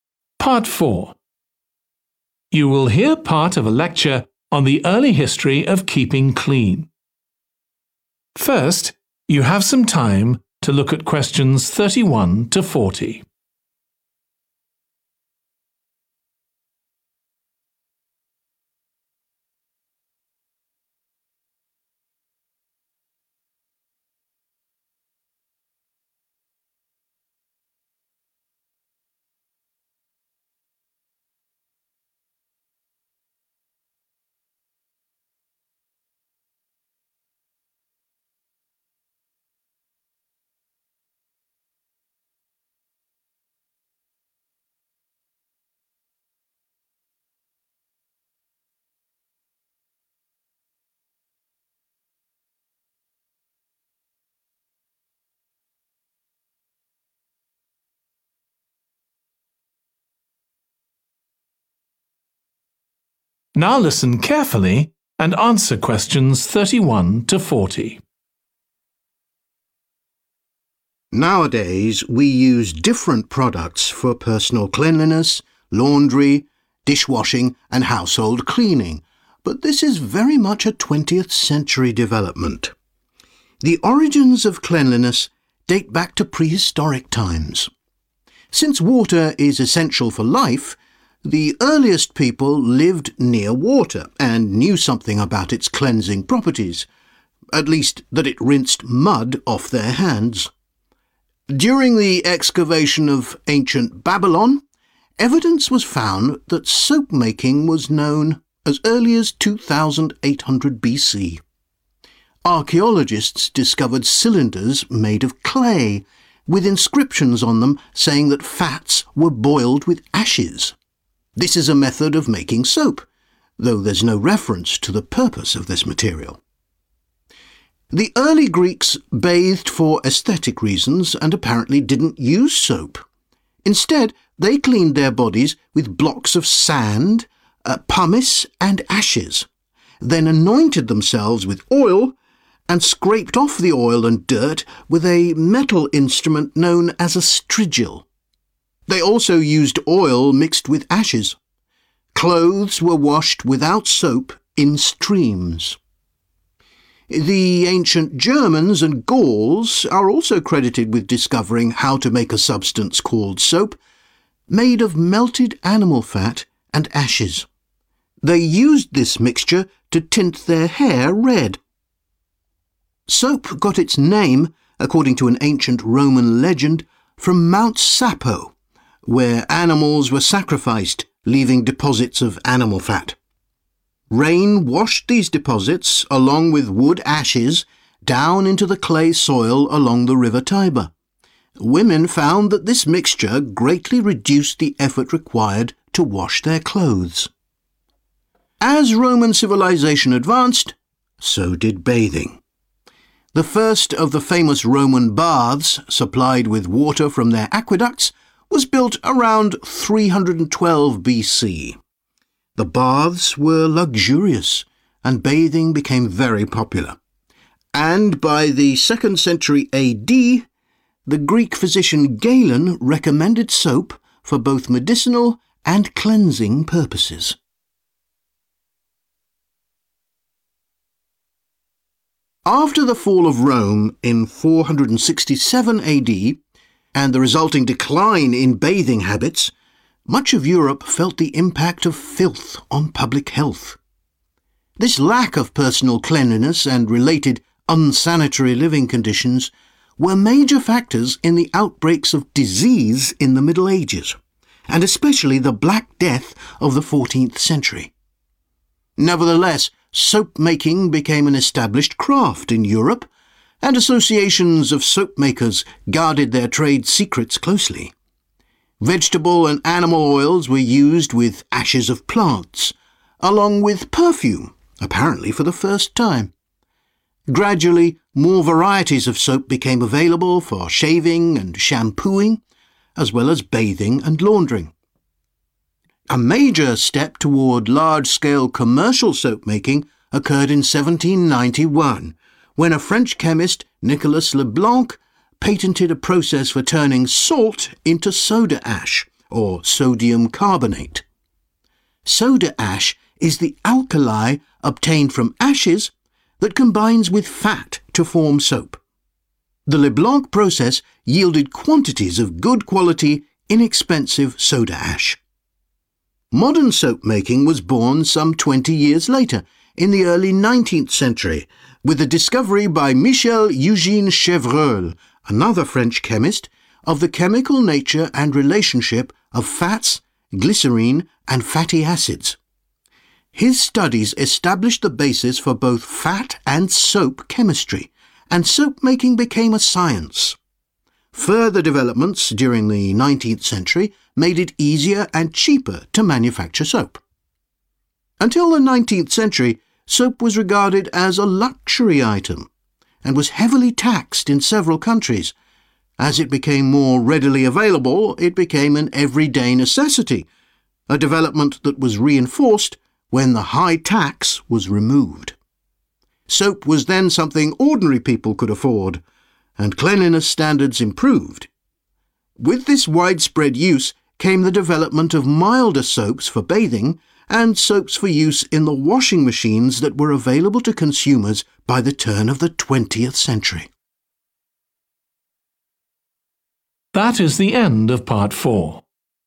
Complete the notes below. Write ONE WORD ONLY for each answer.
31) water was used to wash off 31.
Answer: mud

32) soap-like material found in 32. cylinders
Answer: clay

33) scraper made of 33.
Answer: metal

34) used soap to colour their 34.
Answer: hair

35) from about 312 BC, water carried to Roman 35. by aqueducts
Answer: bath(s)

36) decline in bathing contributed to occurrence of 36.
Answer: disease(s)

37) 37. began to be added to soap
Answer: perfume

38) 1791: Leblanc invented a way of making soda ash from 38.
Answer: salt

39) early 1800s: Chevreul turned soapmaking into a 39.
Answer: science

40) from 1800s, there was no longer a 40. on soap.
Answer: tax